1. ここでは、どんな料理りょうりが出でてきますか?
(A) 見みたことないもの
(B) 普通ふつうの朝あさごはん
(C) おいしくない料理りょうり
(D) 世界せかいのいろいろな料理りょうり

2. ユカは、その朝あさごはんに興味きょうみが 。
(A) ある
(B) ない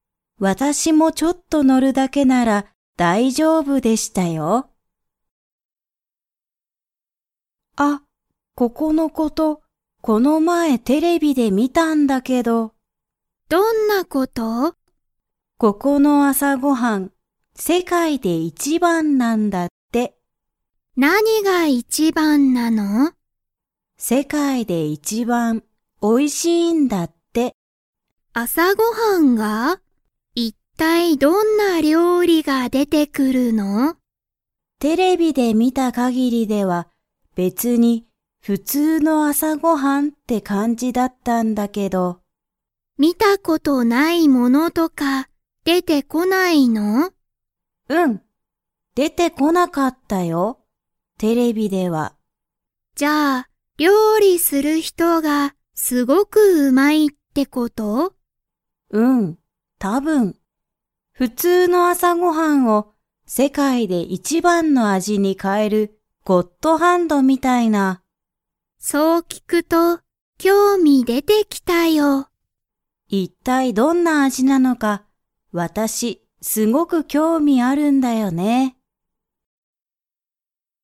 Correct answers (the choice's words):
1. 普通ふつうの朝あさごはん
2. ある

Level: Level 3